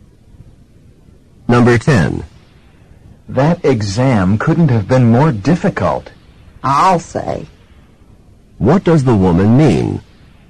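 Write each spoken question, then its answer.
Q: What does the woman mean?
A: She agrees the exam was extremely difficult.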